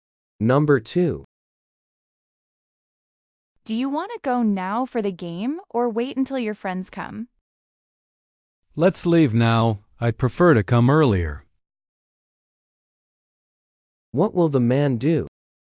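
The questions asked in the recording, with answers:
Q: What will the man do?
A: Leave now for the game.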